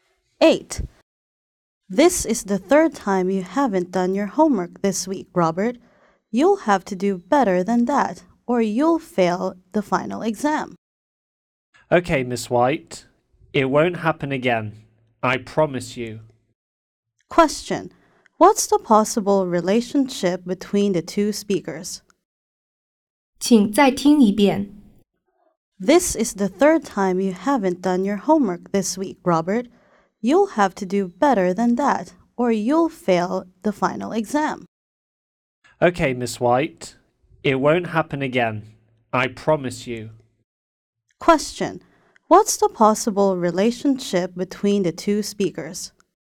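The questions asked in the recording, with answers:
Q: What's the possible relationship between the two speakers?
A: Teacher and student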